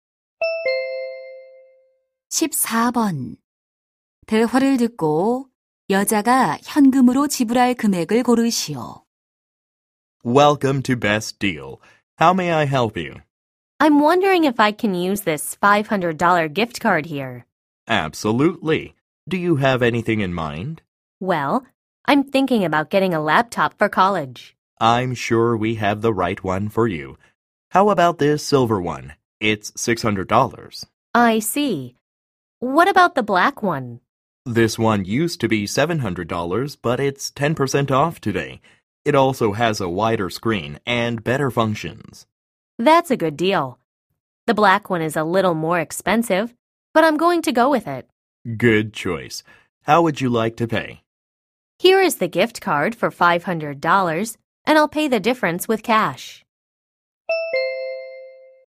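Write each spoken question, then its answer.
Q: 대화를 듣고 여자가 현금으로 지불할 금액을 고르시오.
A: $130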